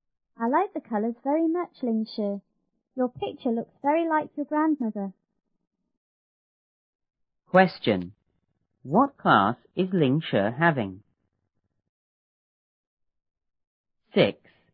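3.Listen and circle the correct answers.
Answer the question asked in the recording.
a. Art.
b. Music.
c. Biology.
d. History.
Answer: a. Art.

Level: 初中英语广州版1B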